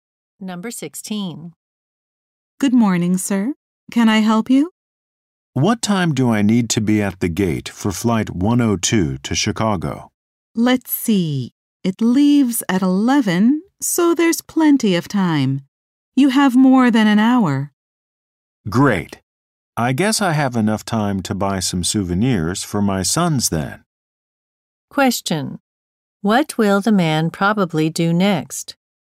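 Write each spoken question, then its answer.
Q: What will the man probably do next?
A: Buy souvenirs for his sons.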